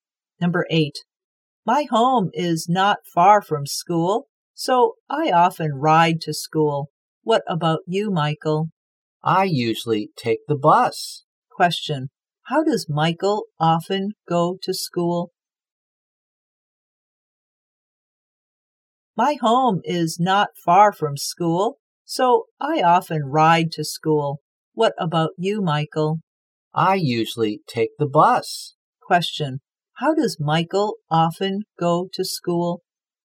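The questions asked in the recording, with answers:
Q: how does Michael often go to school?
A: By bus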